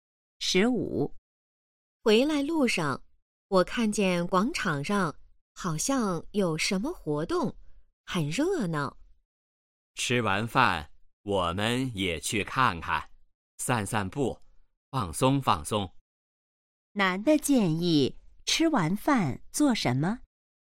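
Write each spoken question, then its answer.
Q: 男的建议吃完饭做什么?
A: 去广场看看,散散步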